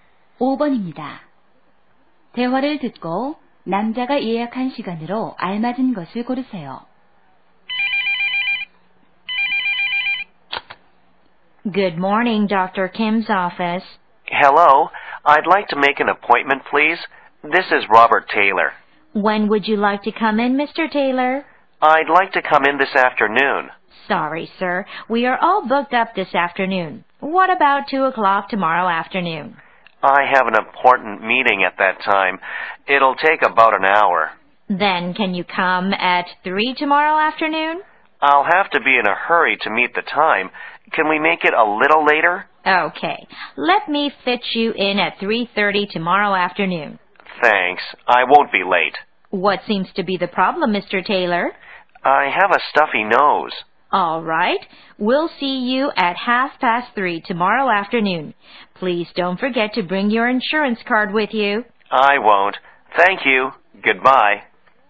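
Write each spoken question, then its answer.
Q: 대화를 듣고 남자가 예약한 시간으로 알맞은 것을 고르세요.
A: 내일 오후 3시 30분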